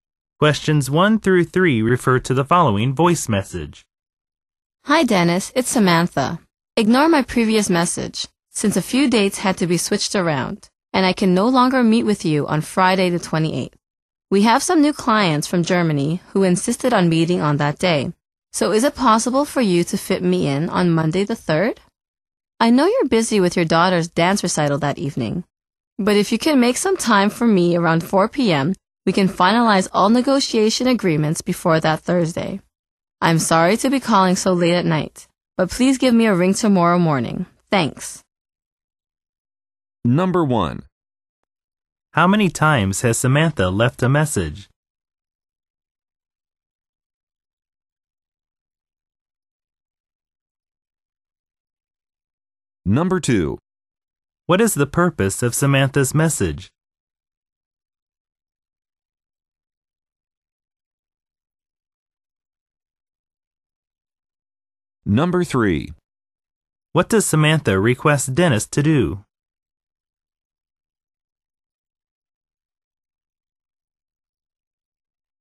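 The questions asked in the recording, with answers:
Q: What is the purpose of Samantha's message?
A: To reschedule their meeting from Friday the 28th to Monday the 3rd

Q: What does Samantha request Dennis to do?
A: Call her back tomorrow morning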